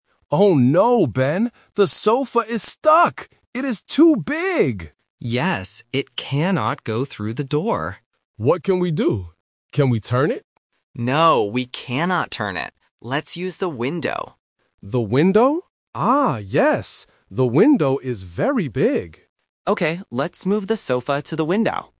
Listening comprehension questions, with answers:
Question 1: What piece of furniture is stuck?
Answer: A sofa

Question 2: Why can't they go through the door?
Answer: The sofa is too big.

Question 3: Where will they take the furniture now?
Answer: Through the window

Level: A1